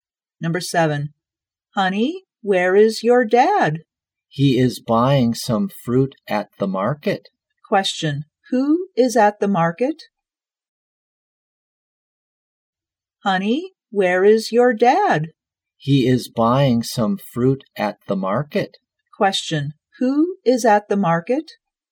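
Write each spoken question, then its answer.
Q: who is at the market?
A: The dad.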